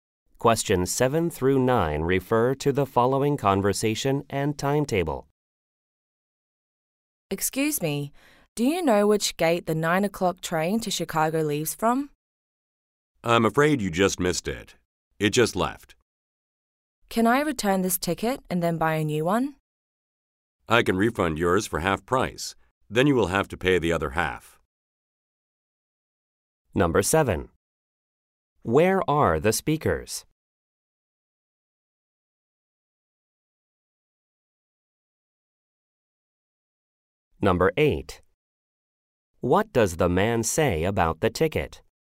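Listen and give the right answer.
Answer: At a train station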